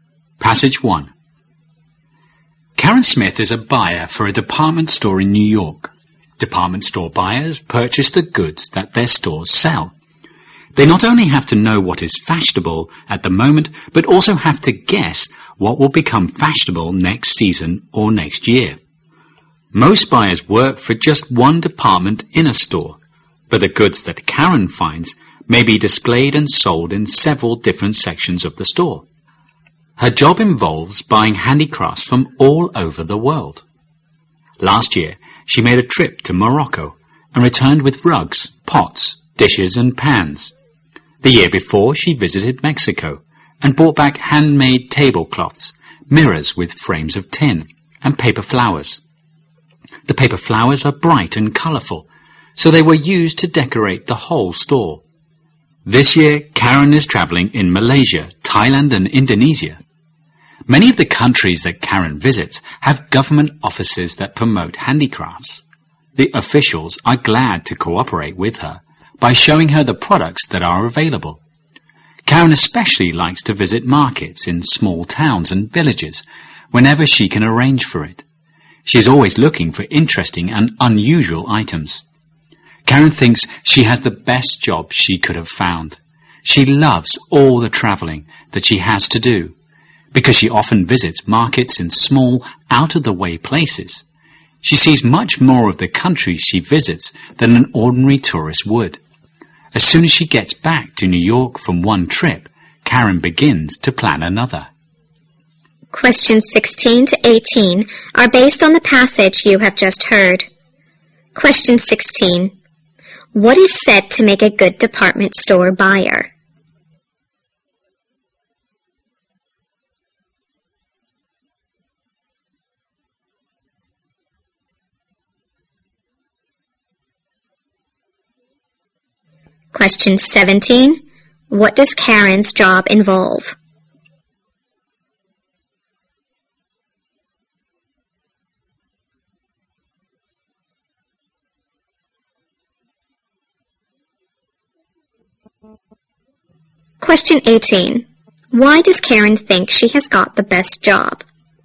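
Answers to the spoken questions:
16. Knowing what is fashionable now and guessing what will become fashionable
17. Buying handicrafts from all over the world
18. She loves traveling and sees much more of the countries than an ordinary tourist would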